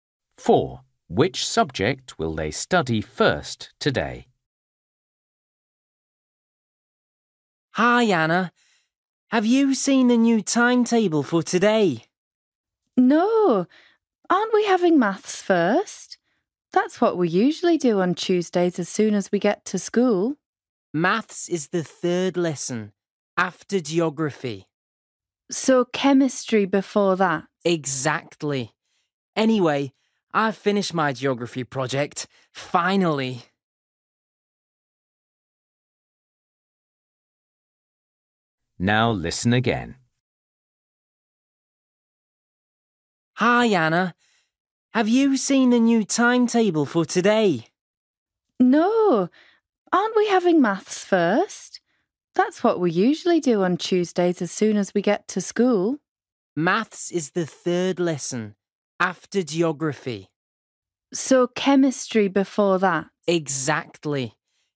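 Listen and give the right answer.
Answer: chemistry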